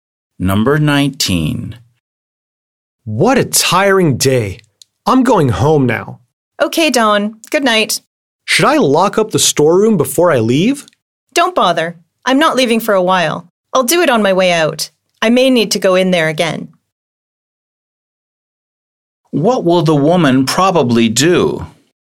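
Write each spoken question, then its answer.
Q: What will the woman probably do?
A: Lock up the storeroom on her way out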